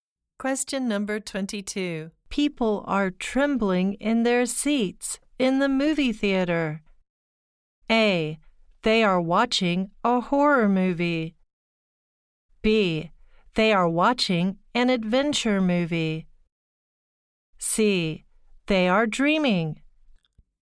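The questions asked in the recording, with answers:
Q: People are trembling in their seats in the movie theater.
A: A: They are watching a horror movie.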